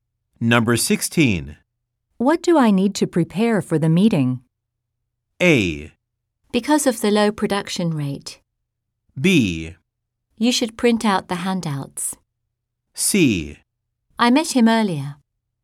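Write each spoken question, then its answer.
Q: What do I need to prepare for the meeting?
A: B: You should print out the handouts.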